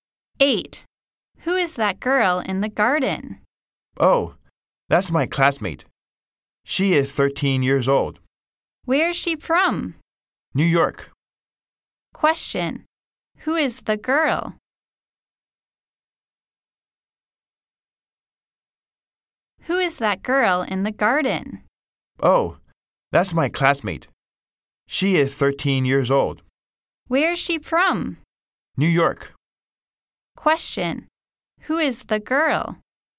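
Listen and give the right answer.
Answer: The speaker's classmate, 13 years old, from New York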